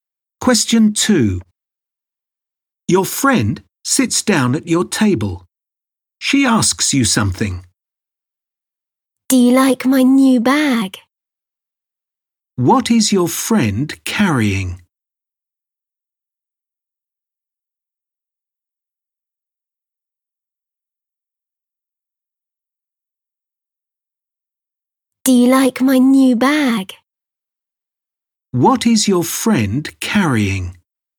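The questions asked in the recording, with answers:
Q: What is your friend carrying?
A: A new bag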